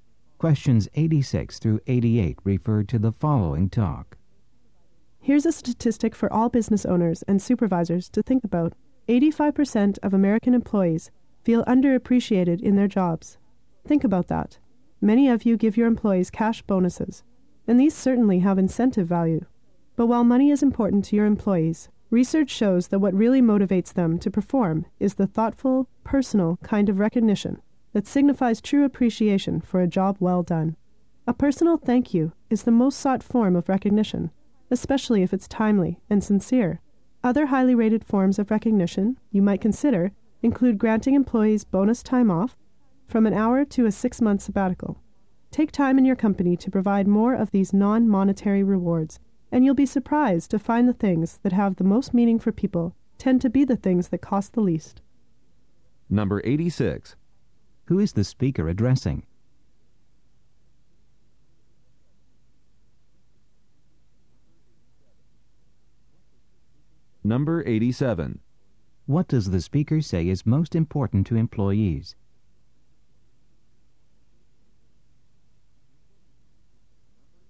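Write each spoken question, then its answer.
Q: Who is the speaker addressing?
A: Business owners and supervisors

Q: What does the speaker say is most important to employees?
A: Thoughtful, personal recognition and appreciation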